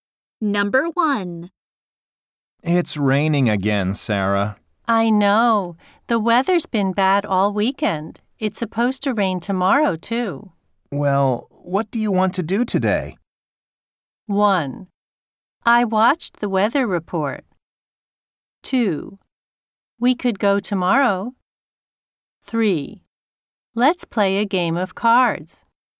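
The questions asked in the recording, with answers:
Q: Well, what do you want to do today?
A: 3: Let's play a game of cards.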